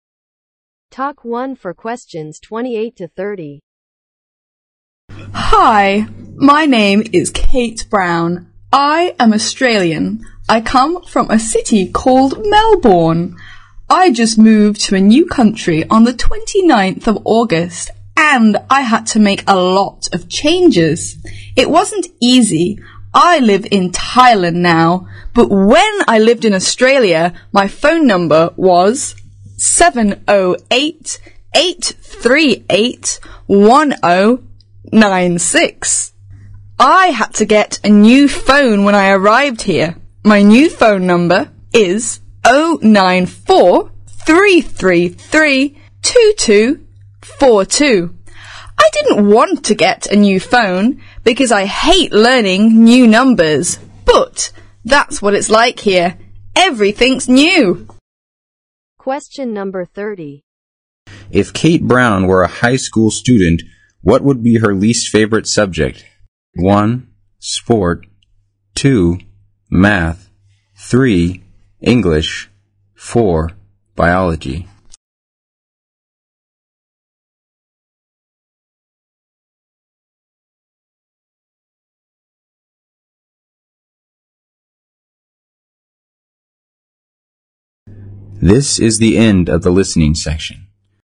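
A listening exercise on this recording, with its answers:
Talk 1 for questions 28 to 30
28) According to the passage, where does Kate live now?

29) What is Kate's new phone number?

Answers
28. Thailand
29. 094-333-2242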